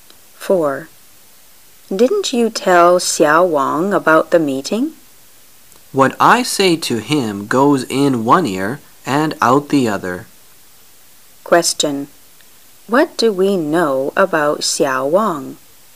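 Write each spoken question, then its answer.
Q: Question: What do we know about Xiao Wang?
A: He doesn't listen to what he's told

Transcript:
[解析] W: Didn't you tell Xiao Wang about the meeting? M: What I say to him goes in one ear and out the other. Q: What do we know about Xiao Wang?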